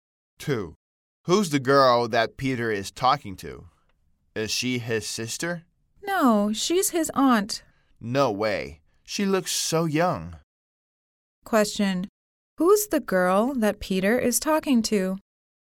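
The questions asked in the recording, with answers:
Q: Who's the girl that Peter is talking to?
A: His aunt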